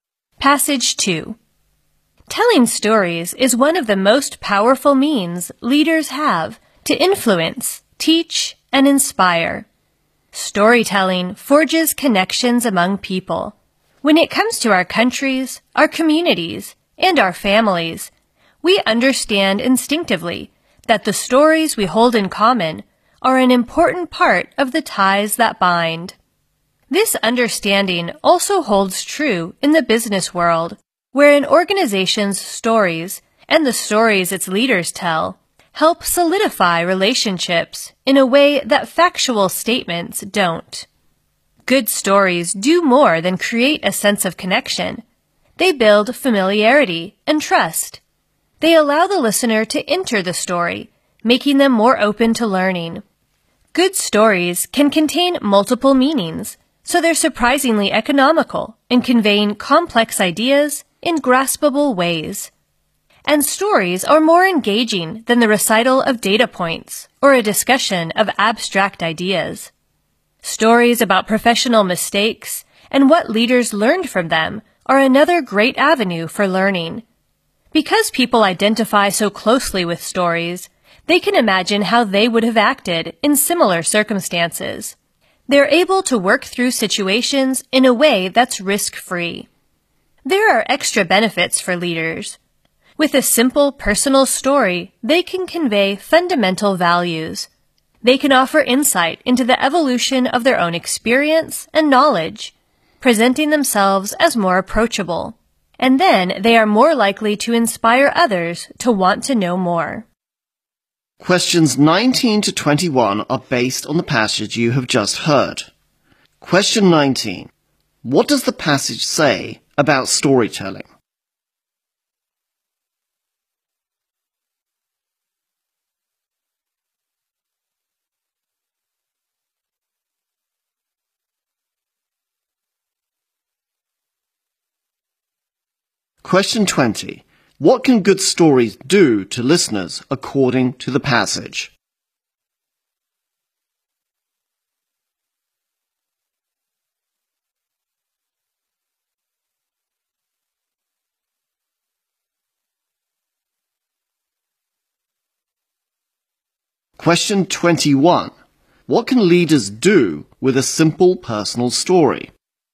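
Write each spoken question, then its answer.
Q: What can leaders do with a simple personal story?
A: Convey fundamental values.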